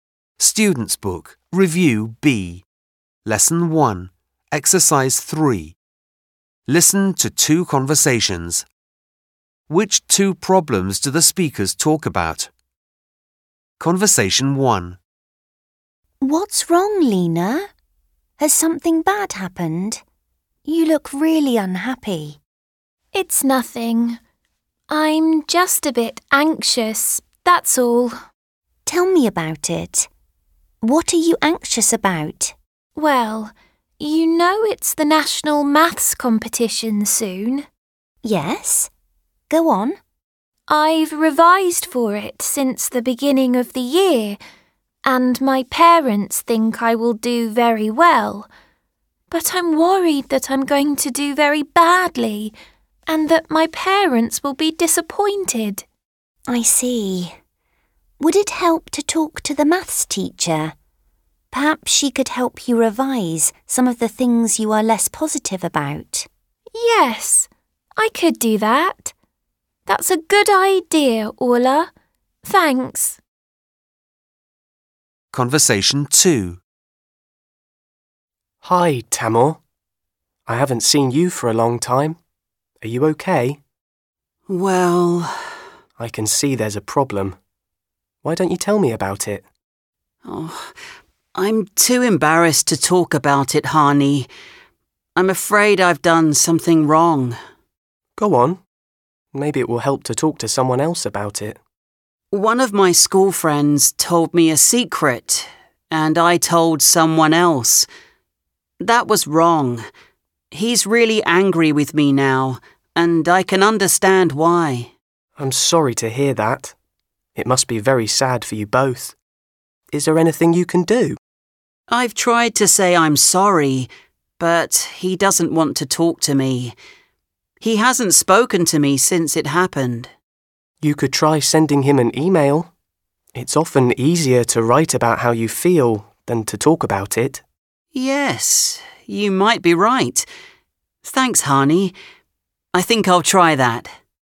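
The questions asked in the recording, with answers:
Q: Which two problems do the speakers talk about?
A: Lena is worried she'll do badly in the national maths competition, and Tamor told someone else a friend's secret.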